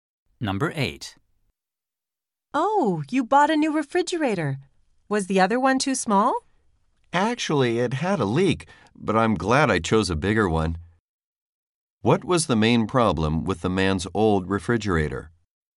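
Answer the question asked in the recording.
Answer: It leaked.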